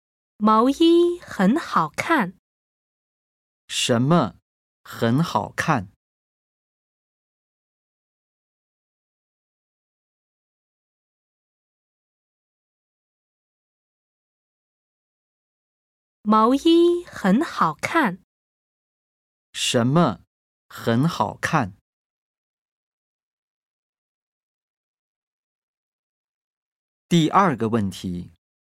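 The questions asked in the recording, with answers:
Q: 什么很好看?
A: 毛衣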